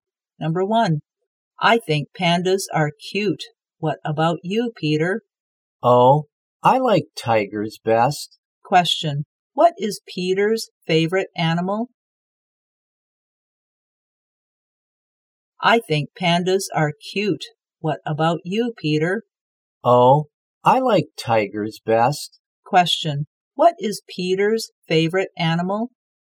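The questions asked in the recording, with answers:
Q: what is Peter's favorite animal?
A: Tigers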